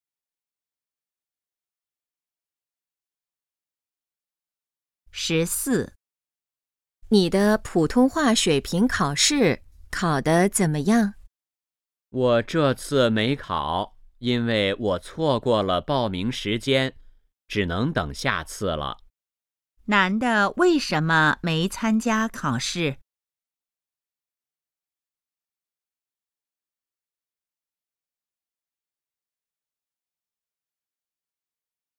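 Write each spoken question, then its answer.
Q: 男的为什么没参加考试?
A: 错过了报名时间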